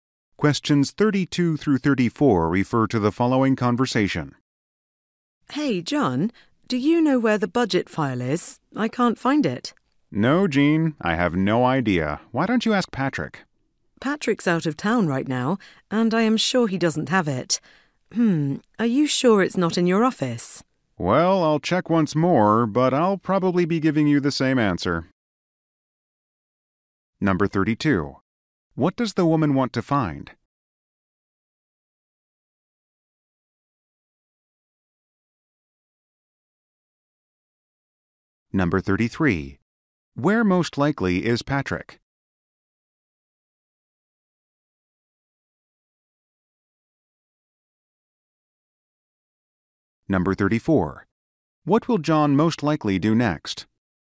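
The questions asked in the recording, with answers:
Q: What does the woman want to find?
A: The budget file

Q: Where most likely is Patrick?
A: Out of town

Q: What will John most likely do next?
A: Check his office again for the file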